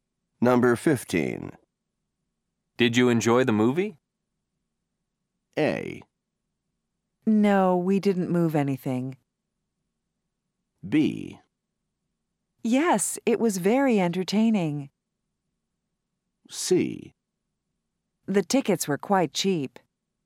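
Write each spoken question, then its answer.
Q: Did you enjoy the movie?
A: B: Yes, it was very entertaining.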